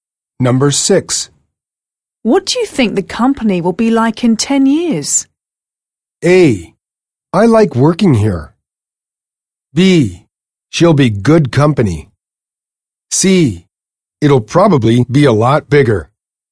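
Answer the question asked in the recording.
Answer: C: It'll probably be a lot bigger.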